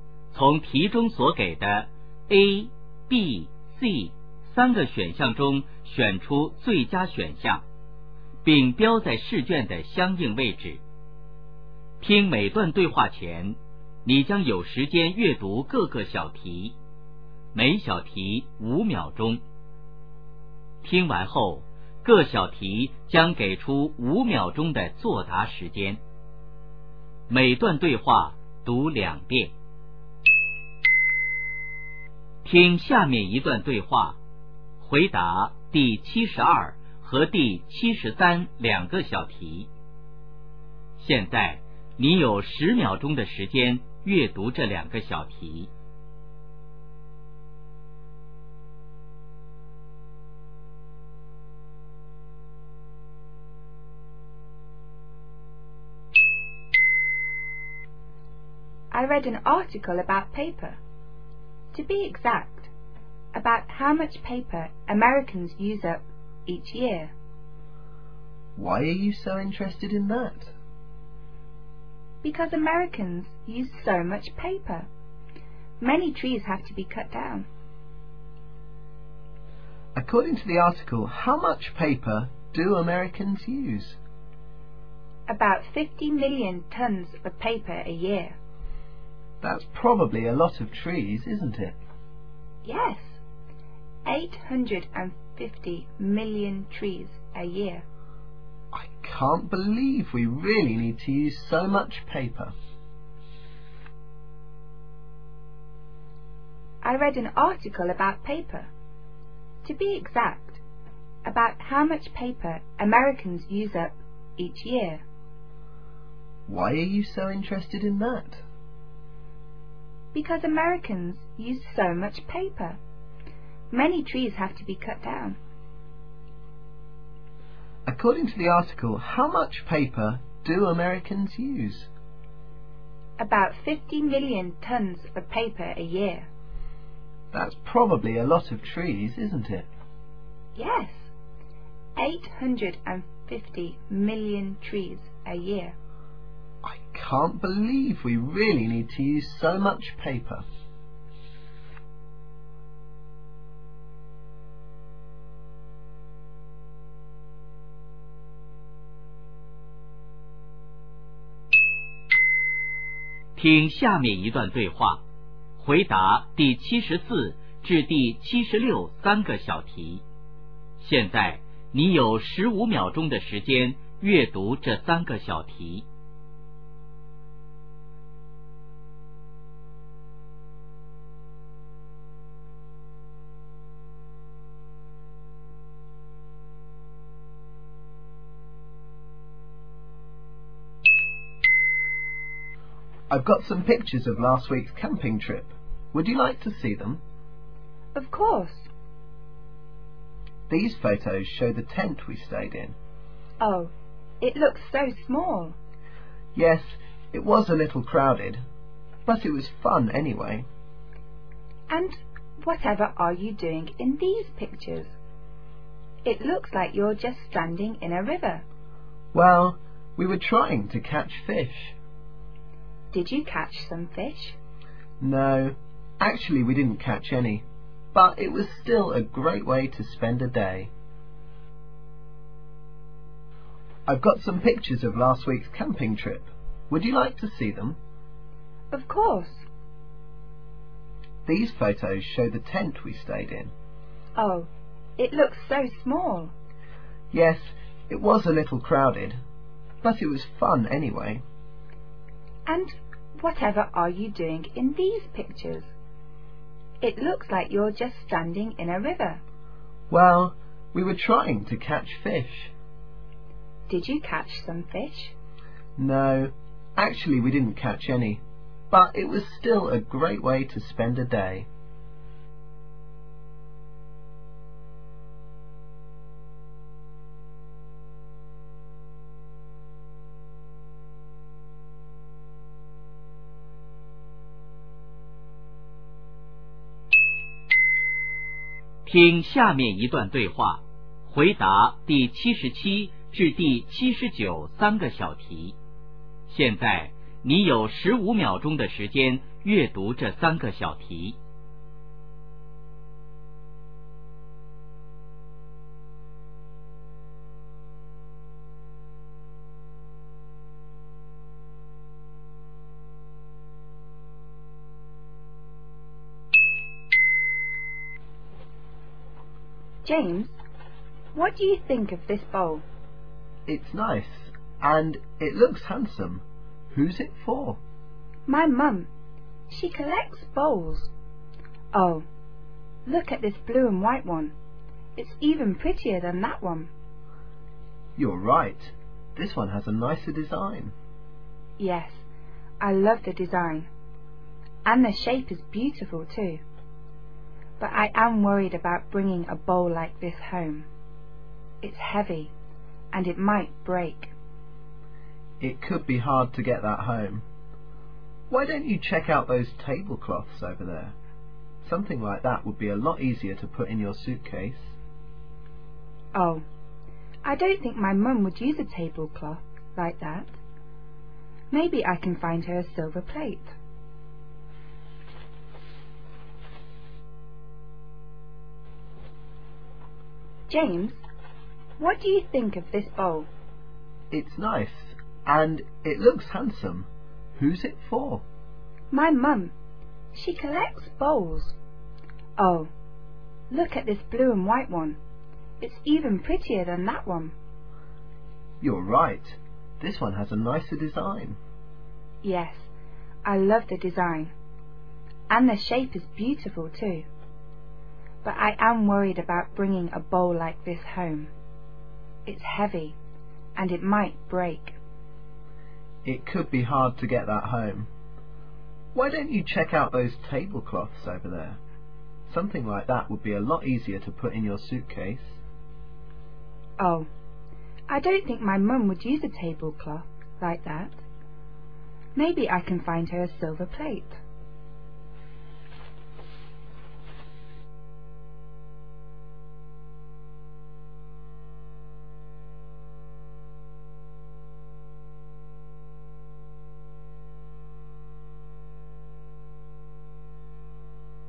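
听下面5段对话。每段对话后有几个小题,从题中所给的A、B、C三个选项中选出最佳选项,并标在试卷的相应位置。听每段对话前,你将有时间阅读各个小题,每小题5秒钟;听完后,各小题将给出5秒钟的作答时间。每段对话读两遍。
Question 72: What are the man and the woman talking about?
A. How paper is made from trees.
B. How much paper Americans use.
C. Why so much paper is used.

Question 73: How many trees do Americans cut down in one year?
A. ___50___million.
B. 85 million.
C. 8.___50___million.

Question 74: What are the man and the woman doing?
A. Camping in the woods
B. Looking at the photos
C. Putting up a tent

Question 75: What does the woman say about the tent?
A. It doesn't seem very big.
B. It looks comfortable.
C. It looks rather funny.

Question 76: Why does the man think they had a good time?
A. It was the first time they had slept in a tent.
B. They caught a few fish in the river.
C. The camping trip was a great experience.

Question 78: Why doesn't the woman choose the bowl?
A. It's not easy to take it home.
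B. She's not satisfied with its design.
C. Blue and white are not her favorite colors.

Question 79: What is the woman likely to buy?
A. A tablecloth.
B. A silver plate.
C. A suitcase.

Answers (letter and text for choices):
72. B. How much paper Americans use.
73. C. 8.___50___million.
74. B. Looking at the photos
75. A. It doesn't seem very big.
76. C. The camping trip was a great experience.
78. A. It's not easy to take it home.
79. B. A silver plate.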